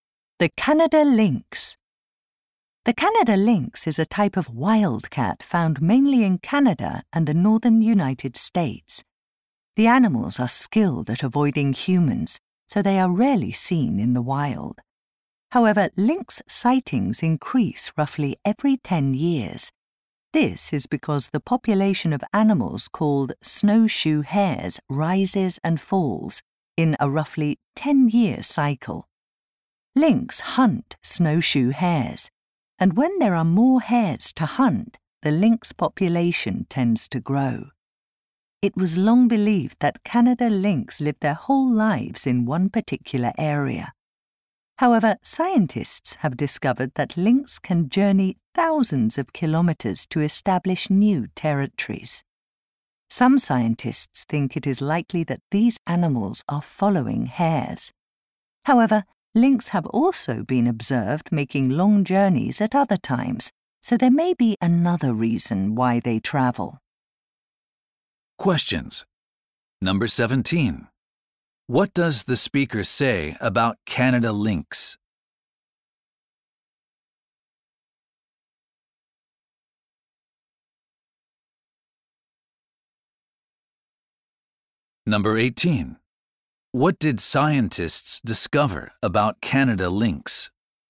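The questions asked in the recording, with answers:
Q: What did scientists discover about Canada lynx?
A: They can travel thousands of kilometers to establish new territories.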